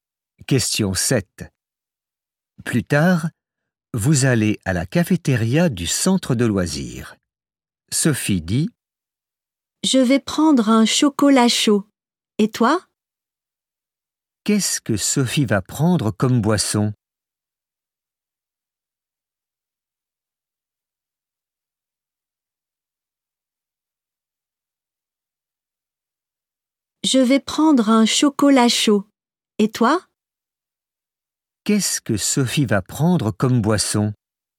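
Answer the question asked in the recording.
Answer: Un chocolat chaud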